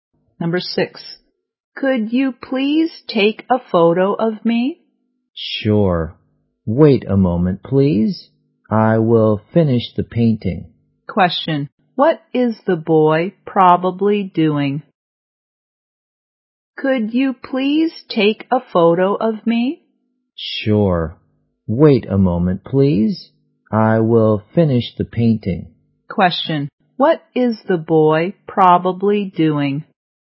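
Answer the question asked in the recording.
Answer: Painting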